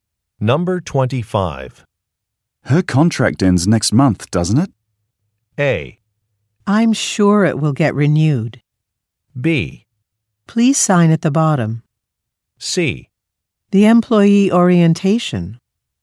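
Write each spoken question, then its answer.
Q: Her contract ends next month, doesn't it?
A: A: I'm sure it will get renewed.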